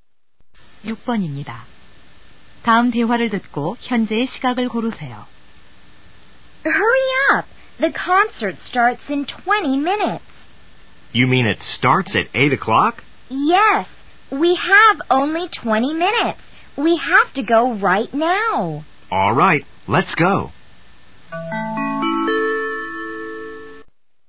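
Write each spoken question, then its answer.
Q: 다음 대화를 듣고 현재의 시각을 고르세요.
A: 7시 40분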